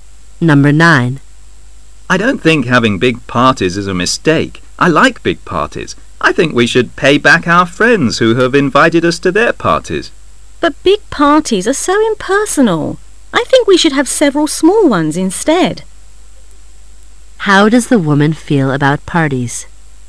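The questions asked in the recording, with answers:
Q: How does the woman feel about parties?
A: She prefers several small parties to big ones

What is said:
[解析] M:I don't think having big pares is a mistake.I like big parties.I think we should pay back our friends who have invited us to their parties. W:But big parties are so impersonal.I think we should have several small ones instead. Q:How does the woman feel about parties?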